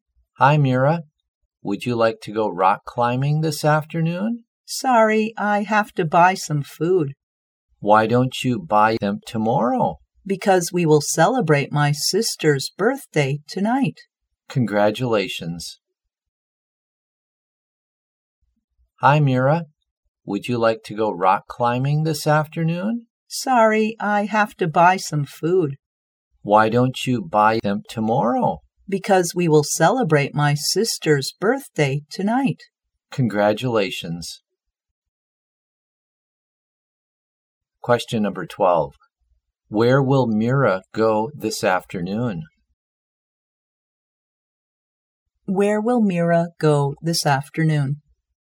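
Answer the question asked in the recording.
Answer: To buy some food (shopping)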